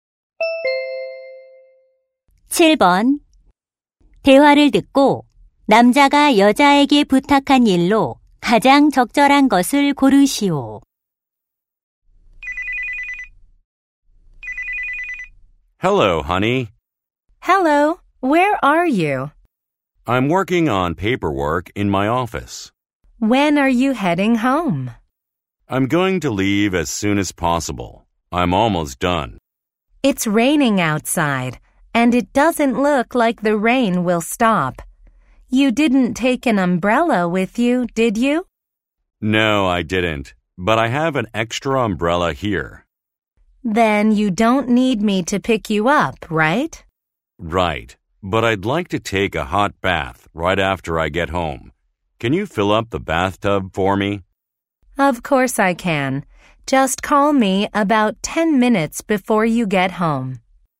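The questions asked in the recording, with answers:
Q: 대화를 듣고 남자가 여자에게 부탁한 일로 가장 적절한 것을 고르시오.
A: 욕조에 물 받아 놓기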